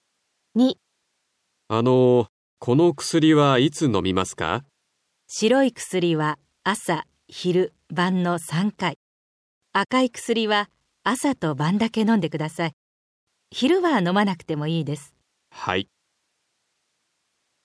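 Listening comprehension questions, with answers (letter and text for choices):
サントスさんは 病院へ 行きました。何を しなければなりませんか。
{a. 白い b. 赤い} 薬は 1日に 2回 飲みます。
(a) 白い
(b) 赤い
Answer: (b) 赤い

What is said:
A: あのう、 この 薬は いつ飲みますか。
B: 白い薬は 朝、 昼、 晩の3回、 赤い薬は
朝と晩だけ飲んでください。 昼は 飲まなくても いいです。
A: はい。

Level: 初級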